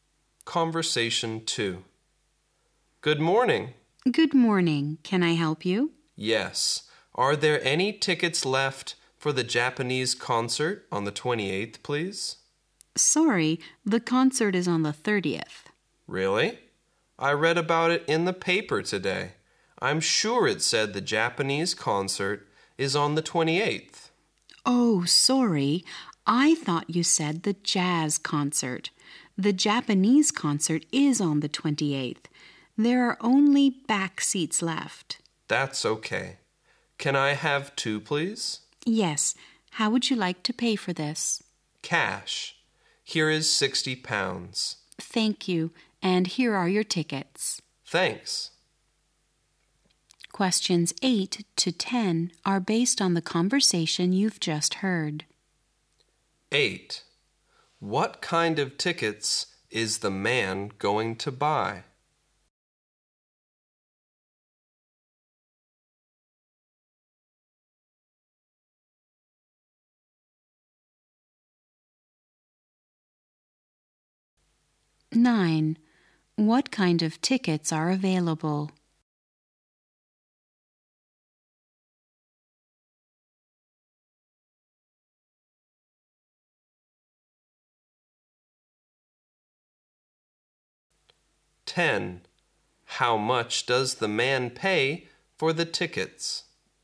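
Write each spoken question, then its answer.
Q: What kind of tickets is the man going to buy?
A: Tickets for the Japanese concert on the 28th

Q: What kind of tickets are available?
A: Only back seats

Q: How much does the man pay for the tickets?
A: £60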